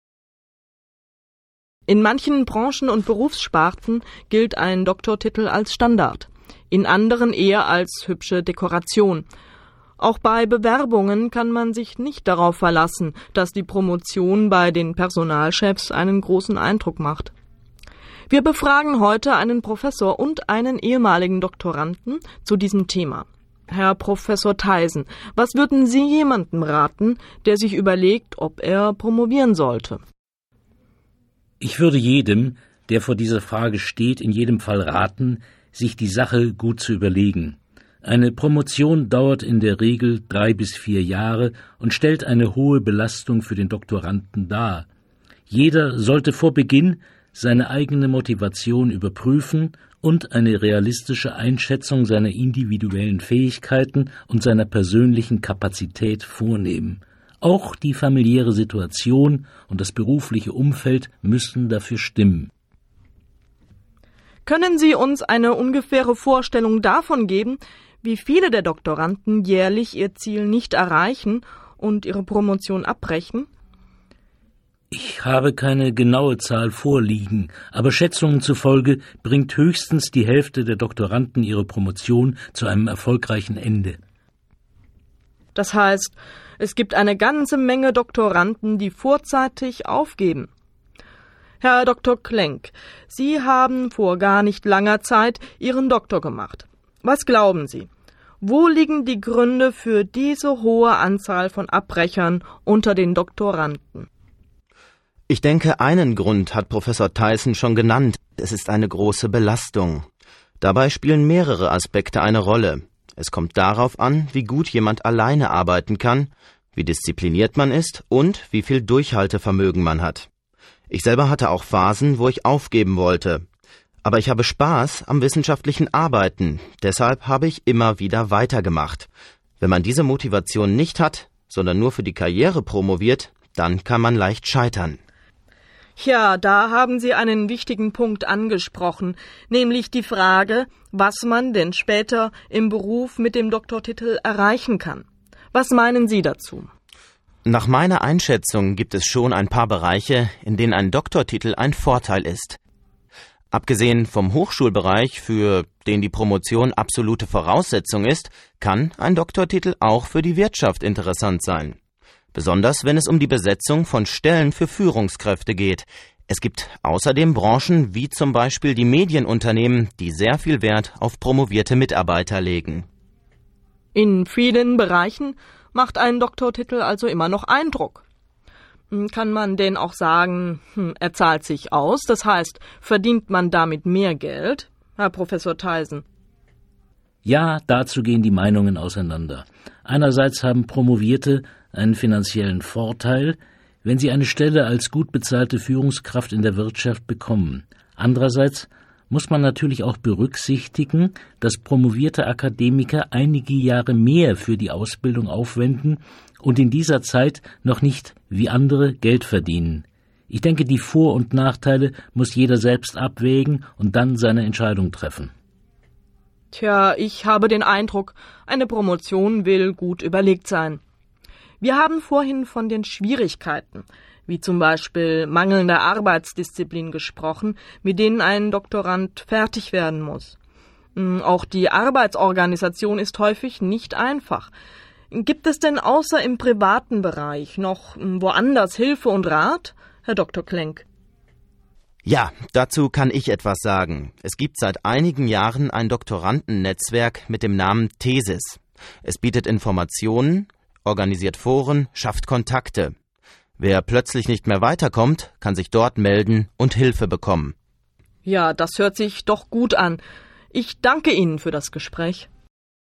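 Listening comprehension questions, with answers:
Entscheiden Sie beim Hören, welche Aussagen richtig oder falsch sind. Markieren Sie die passende Antwort.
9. Prof. Theisen meint, durch die Promotion würde auch die Familie des Doktoranden belastet.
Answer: Falsch

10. Prof. Theisen behauptet, dass die Mehrzahl der Doktoranden ihre Promotion abschließt.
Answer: Falsch

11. Die Interviewerin berichtet, dass Dr. Klenk schon vor vielen Jahren seinen Doktortitel erhalten hat.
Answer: Falsch

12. Dr. Klenk glaubt, dass manche die Promotion abbrechen, weil sie nicht gut alleine klar kommen.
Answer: Richtig

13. Dr. Klenk meint, dass die Karriere nicht die einzige Motivation für einen Doktortitel sein sollte.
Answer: Richtig

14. Dr. Klenk beklagt die schlechten Karrierechancen für Promovierte auf dem Arbeitsmarkt.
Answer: Falsch

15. Dr. Klenk meint, Unternehmen in Presse, Funk und Fernsehen würden bei ihren Mitarbeitern auf Doktortitel verzichten.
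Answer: Falsch

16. Prof. Theisen glaubt, dass eine Promotion im Berufsleben auch ein finanzieller Gewinn sein kann.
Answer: Richtig

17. Die Interviewerin glaubt, dass es viele Schwierigkeiten für Doktoranden gibt.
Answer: Richtig

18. Dr. Klenk berichtet, dass Doktoranden bei ?Thesis? Unterstützung erhalten können.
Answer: Richtig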